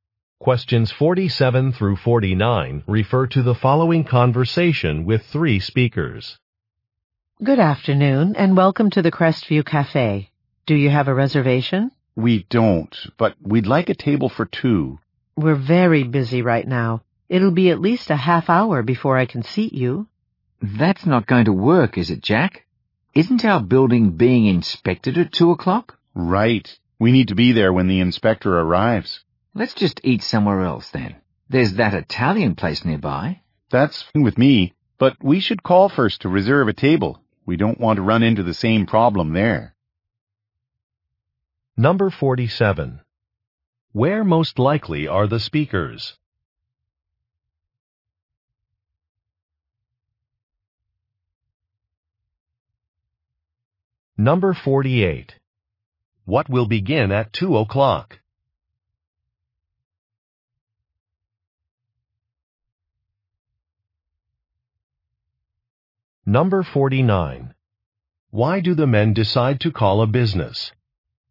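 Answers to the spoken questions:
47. At a cafe
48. A building inspection
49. To reserve a table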